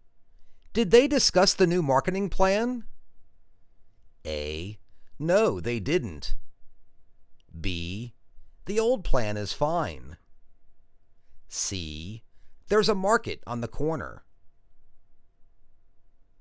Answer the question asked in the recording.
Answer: No, they didn't.